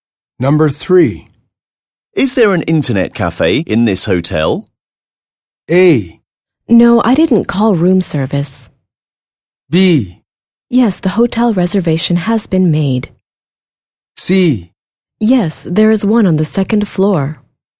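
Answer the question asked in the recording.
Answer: C: Yes, there is one on the second floor.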